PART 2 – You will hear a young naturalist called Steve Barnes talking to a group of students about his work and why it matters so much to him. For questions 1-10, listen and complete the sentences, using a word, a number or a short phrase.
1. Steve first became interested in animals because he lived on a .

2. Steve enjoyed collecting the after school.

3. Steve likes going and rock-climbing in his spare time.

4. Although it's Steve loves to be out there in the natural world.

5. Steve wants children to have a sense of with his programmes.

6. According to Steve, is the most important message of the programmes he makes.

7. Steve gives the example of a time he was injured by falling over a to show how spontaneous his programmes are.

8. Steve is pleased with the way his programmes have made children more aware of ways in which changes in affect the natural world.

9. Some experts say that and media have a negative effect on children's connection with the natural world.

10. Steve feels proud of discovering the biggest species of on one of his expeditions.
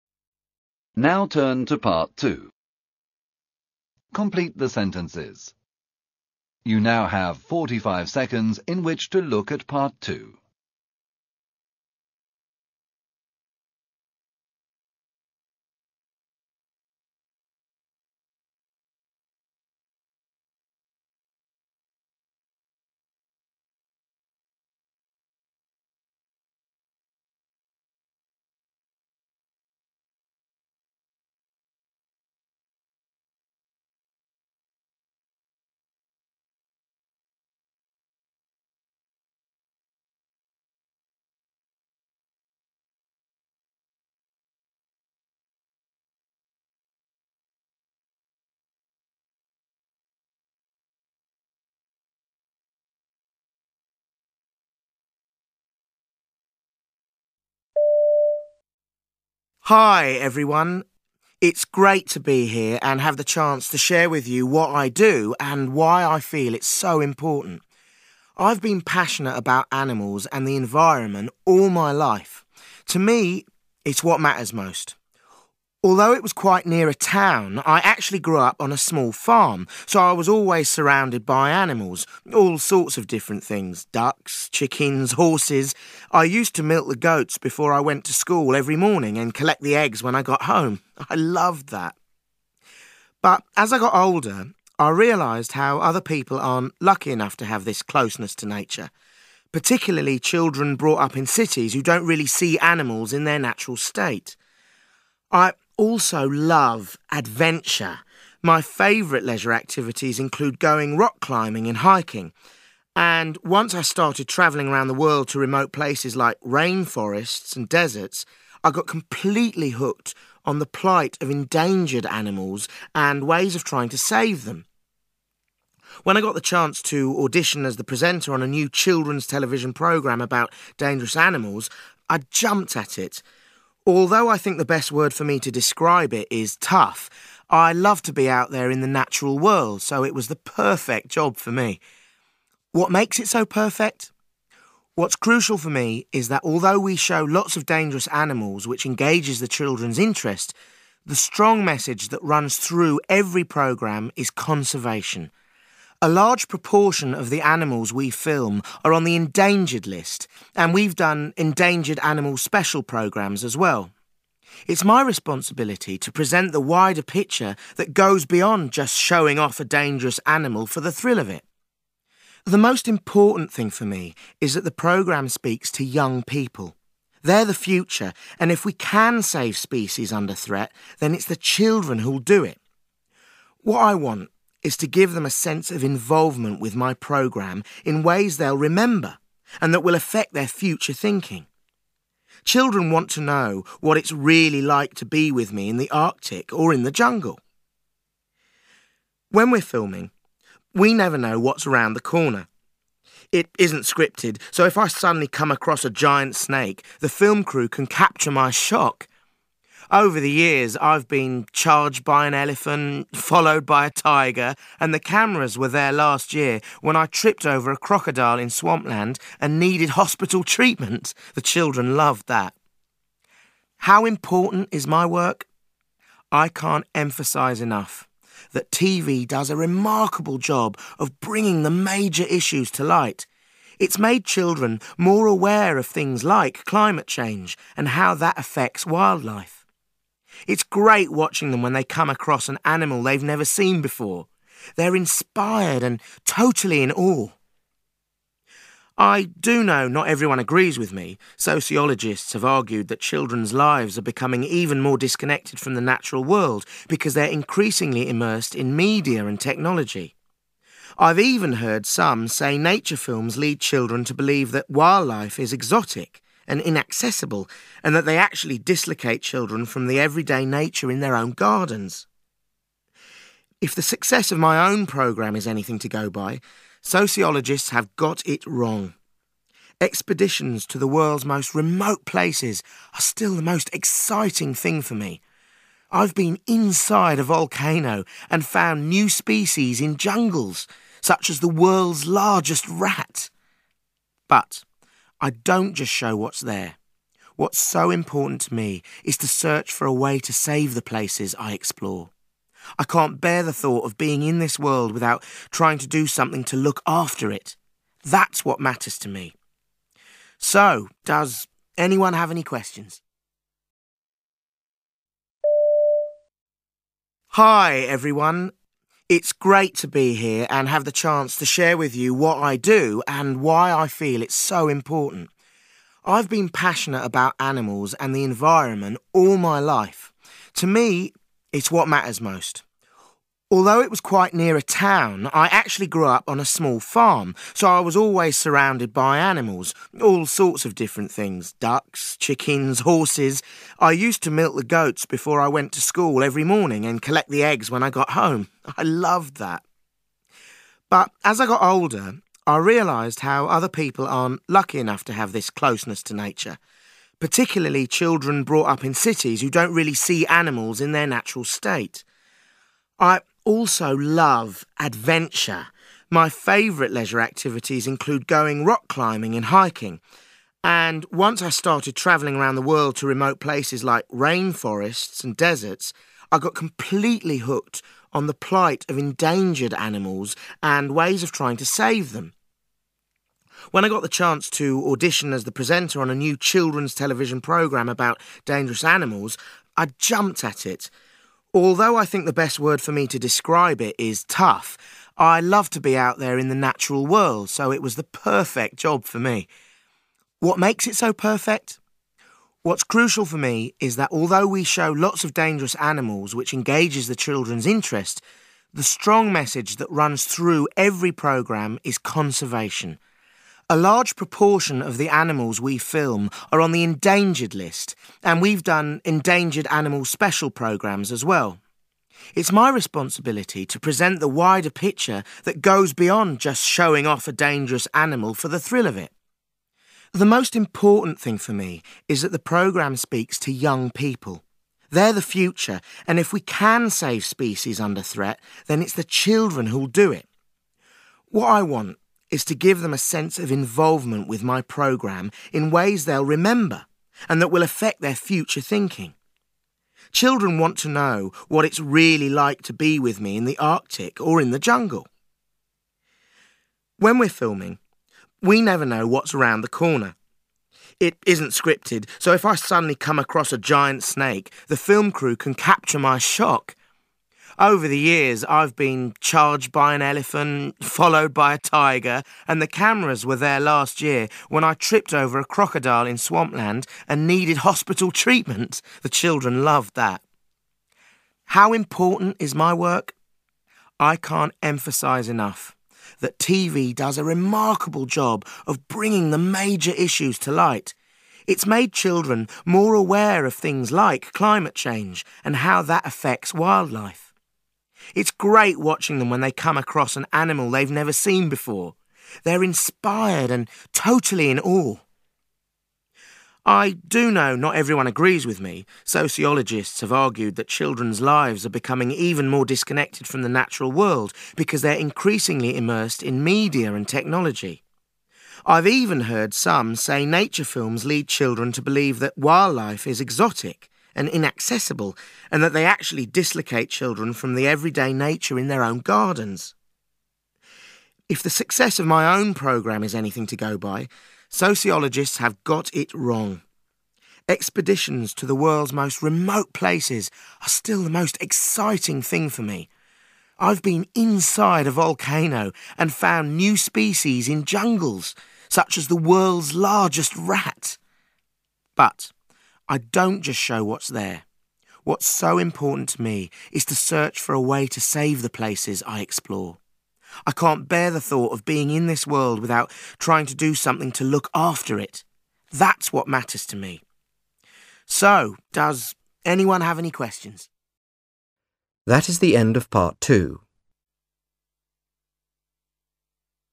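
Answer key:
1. small farm
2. eggs
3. hiking
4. tough
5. involvement
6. conservation
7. crocodile
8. climate
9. technology
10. rat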